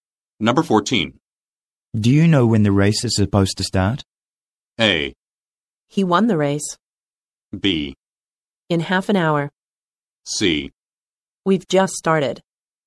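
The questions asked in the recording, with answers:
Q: Do you know when the race is supposed to start?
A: B: In half an hour.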